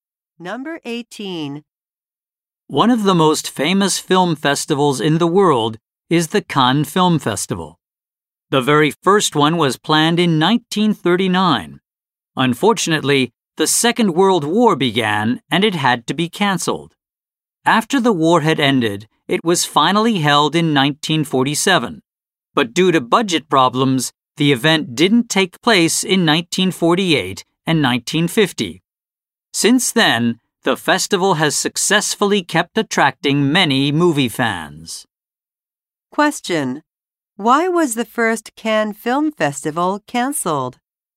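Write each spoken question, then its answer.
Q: Why was the first Cannes Film Festival cancelled?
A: The Second World War began.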